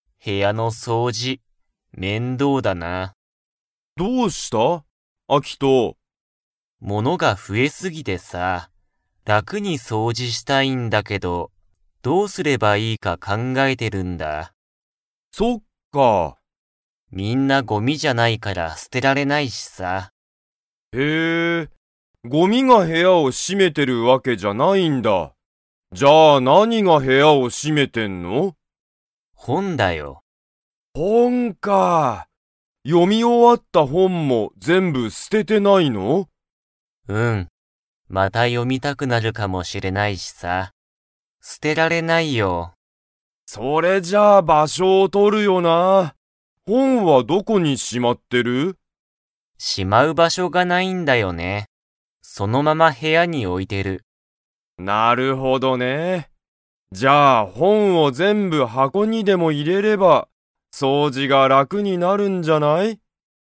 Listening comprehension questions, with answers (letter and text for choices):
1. 何なにが、アキトの部屋へやを占しめていますか?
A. ごみ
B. 掃除そうじ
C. 本ほん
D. アニメ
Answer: C. 本ほん

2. アキトは、本ほんをどこかに 。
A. しまっている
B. しまっていない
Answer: B. しまっていない

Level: Level 4